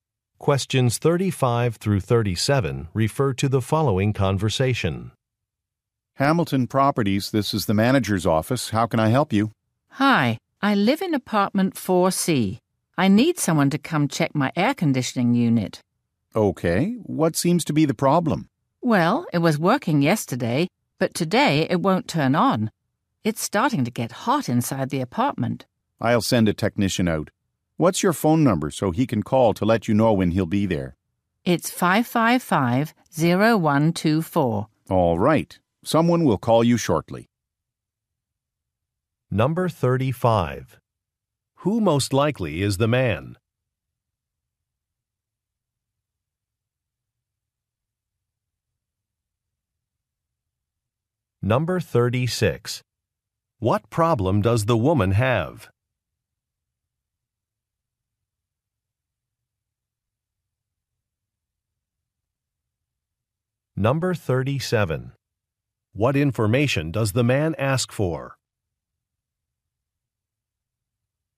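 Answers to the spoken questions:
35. A property manager's office employee
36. Her air conditioning won't turn on
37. Her phone number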